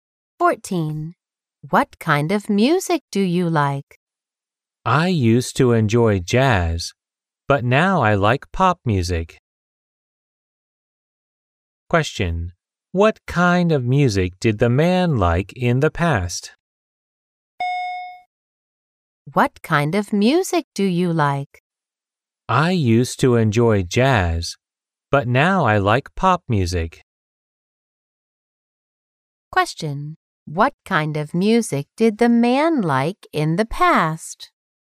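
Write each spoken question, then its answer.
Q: What kind of music did the man like in the past?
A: Jazz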